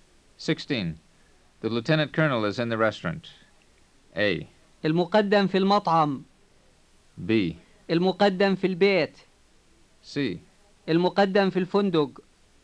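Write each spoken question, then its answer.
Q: The lieutenant colonel is in the restaurant.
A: A: المقدم في المطعم.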